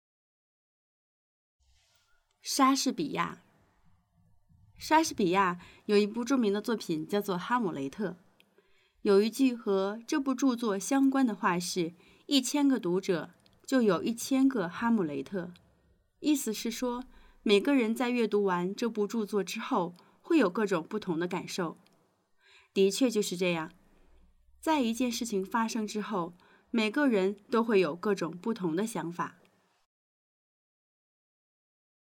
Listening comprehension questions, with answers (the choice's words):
一千个读者就有一千个哈姆雷特是什么意思?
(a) 莎士比亚写了一本书,书里有一千个哈姆雷特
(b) 读者觉得莎士比亚应该再创造一千个哈姆雷特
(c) 莎士比亚希望能写出像哈姆雷特一样的一千个人物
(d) 一千个作者就会对哈姆雷特产生出一千种不同的理解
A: 一千个作者就会对哈姆雷特产生出一千种不同的理解

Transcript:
莎士比亚 莎士比亚有一部著名的作品,叫做《哈姆雷特》。有一句和这部著作相关的话是,一千个读者,就有一千个哈姆雷特。意思是说,每个人在阅读完这部著作之后,会有各种不同的感受。 的确就是这样,在一件事情发生之后,每个人都会有各种不同的看法。